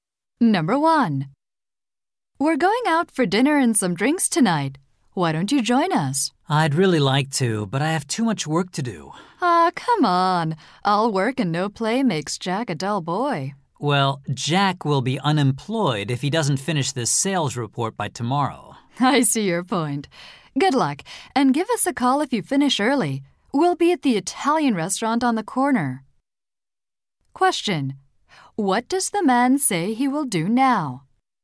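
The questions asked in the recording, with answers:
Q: What does the man say he will do now?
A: Keep working to finish his sales report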